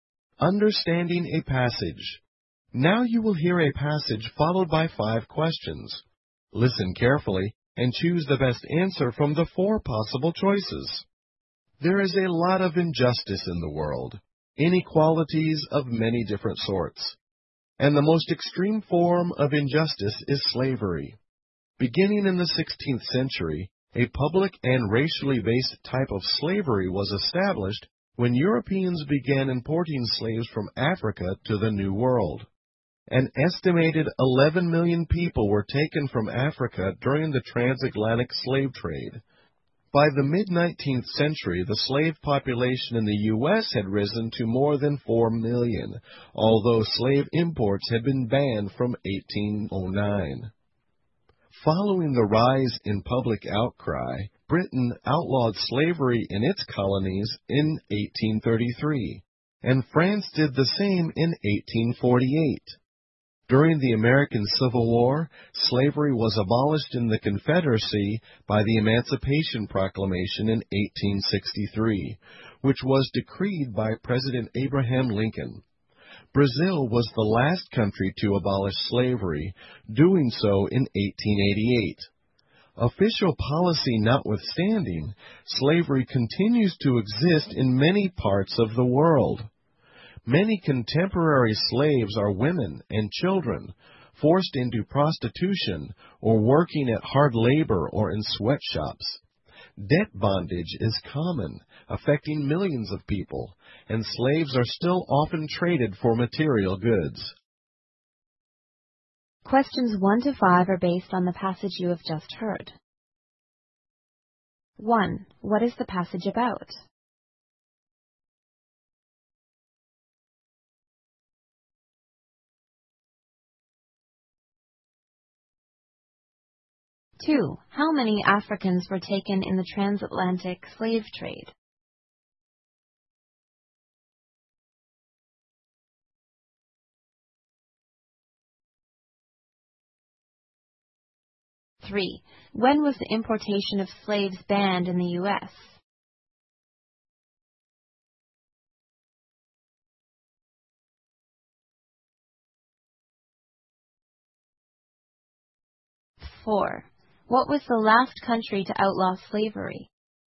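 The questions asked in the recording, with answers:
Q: What is the passage about?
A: Slavery.

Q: How many Africans were taken in the transatlantic slave trade?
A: An estimated 11 million.

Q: When was the importation of slaves banned in the U.S.?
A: 1809.

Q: What was the last country to outlaw slavery?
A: Brazil.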